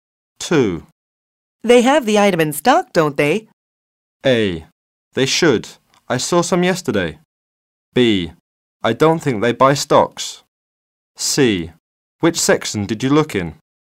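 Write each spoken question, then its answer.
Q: They have the item in stock, don't they?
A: A: They should. I saw some yesterday.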